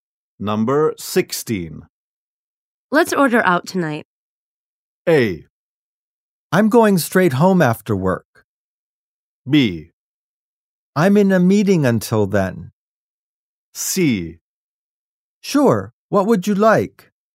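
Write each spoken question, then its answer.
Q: Let's order out tonight.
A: C: Sure, what would you like?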